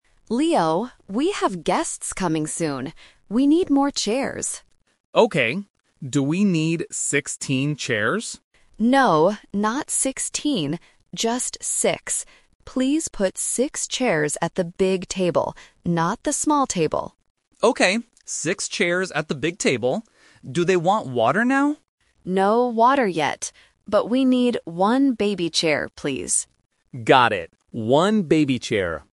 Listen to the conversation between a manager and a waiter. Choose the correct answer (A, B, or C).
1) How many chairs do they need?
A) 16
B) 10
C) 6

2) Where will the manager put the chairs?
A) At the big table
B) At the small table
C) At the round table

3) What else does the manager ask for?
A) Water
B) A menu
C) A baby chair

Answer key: 1C, 2A, 3C

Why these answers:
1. The manager clearly says, "Just 6. Please put 6 chairs..."
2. The manager tells Leo to put the chairs "at the big table."
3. The manager says, "But we need one baby chair, please."

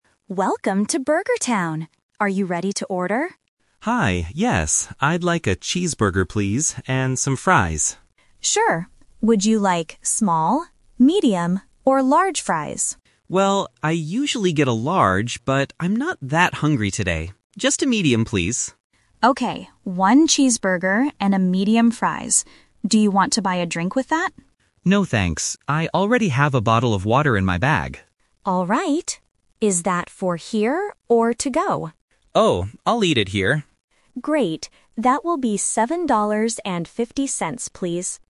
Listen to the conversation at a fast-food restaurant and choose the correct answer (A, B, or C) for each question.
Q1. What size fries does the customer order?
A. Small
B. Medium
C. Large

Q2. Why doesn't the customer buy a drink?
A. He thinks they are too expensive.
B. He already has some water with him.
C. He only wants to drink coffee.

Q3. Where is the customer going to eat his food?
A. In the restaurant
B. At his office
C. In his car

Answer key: 1B, 2B, 3A

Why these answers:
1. The customer clearly says, "Just a medium, please." Option (C) is the trap; he mentions that he usually gets a large, but he changes his mind because he isn't very hungry. Option (A) is a plausible size but is rejected.
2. When the cashier asks if he wants a drink, he replies, "No, thanks. I already have a bottle of water in my bag." Options (A) and (C) are plausible reasons to refuse a drink at a fast-food place, but neither is mentioned in the conversation.
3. The cashier asks, "Is that for here or to go?" and the customer answers, "I'll eat it here," meaning inside the restaurant. Options (B) and (C) are traps; these are places he might take the food if he ordered it "to go," but he decides to stay.

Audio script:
Cashier: Welcome to Burger Town. Are you ready to order?
Customer: Hi, yes. I'd like a cheeseburger, please. And some fries.
Cashier: Sure. Would you like small, medium, or large fries?
Customer: Well, I usually get a large, but I'm not that hungry today. Just a medium, please.
Cashier: Okay, one cheeseburger and a medium fries. Do you want to buy a drink with that?
Customer: No, thanks. I already have a bottle of water in my bag.
Cashier: Alright. Is that for here or to go?
Customer: Oh, I'll eat it here.

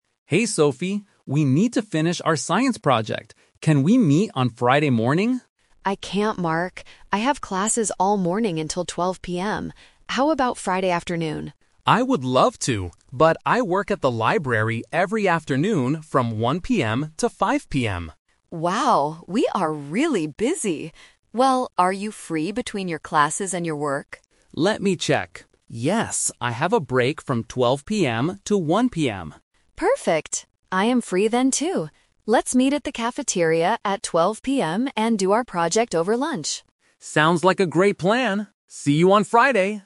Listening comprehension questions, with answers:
Listen to the conversation and choose the correct answer (A, B, or C).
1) What time will Mark and Sophie meet?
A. Friday morning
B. Friday at 12:00 PM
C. Friday afternoon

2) Why can't Mark meet in the afternoon?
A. He has classes all afternoon.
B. He works at the library.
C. He is going to a science club.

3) Where will they meet to do their project?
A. At the library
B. In a classroom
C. At the cafeteria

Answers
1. B
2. B
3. C

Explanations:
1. They agree to meet during their break at 12:00 PM. Option (A) is a trap because Mark suggests Friday morning first, but Sophie is busy. Option (C) is a trap because Sophie suggests the afternoon, but Mark is busy.
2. Mark says, "I work at the library every afternoon." Option (A) is a trap because having "classes" is Sophie's reason for being busy in the morning, not Mark's. Option (C) is a plausible reason for a student, but it is not mentioned.
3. Sophie says, "Let's meet at the cafeteria." Option (A) is a trap because the library is where Mark works, not where they will meet for the project. Option (B) is a trap because classes are mentioned, but they are not meeting in a classroom.

